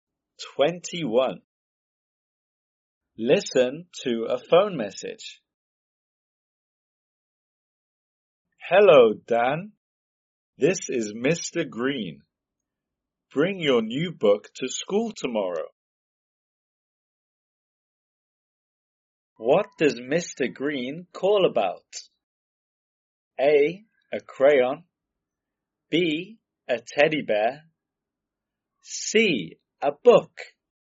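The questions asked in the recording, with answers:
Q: What does Mr. Green call about?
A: C: A book.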